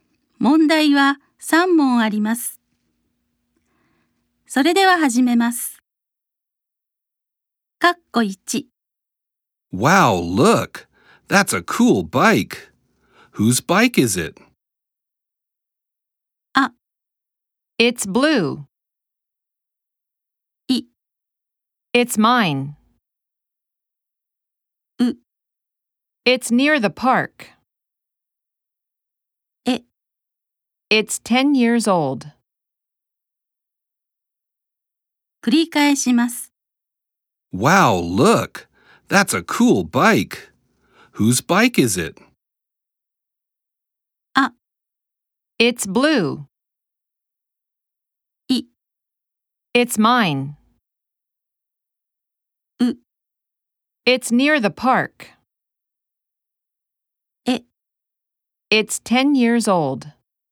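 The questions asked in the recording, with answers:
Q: Whose bike is it?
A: い: It's mine.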